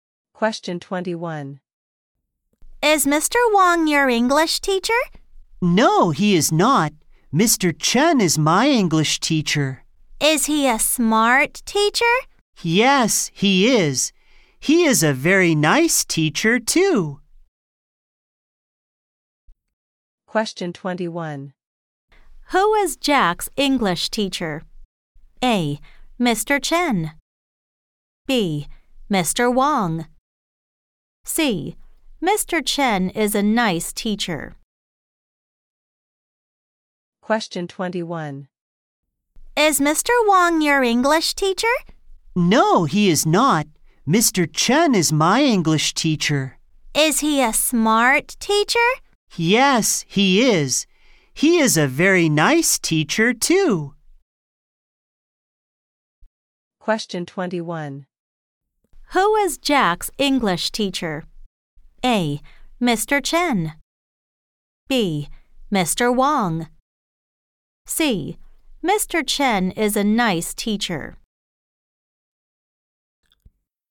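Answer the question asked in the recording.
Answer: A: Mr. Chen.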